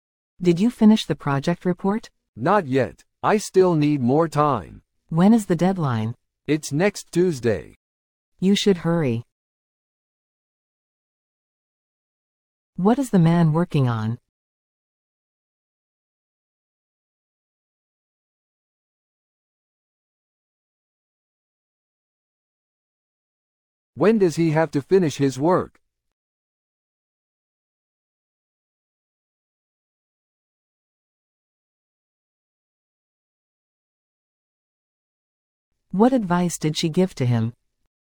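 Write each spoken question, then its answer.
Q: What is the man working on?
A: The project report

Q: When does he have to finish his work?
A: Next Tuesday

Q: What advice did she give to him?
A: To hurry

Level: 初級者用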